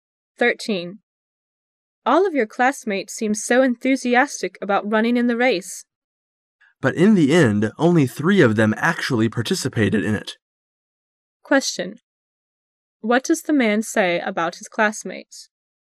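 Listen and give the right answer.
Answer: Only three of them actually ran in the race

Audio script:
[解析] W: All of your classmates seem so enthusiastic about running in the race. M: But in the end only three of them actually participated in it, Q: What does the man say about his classmates?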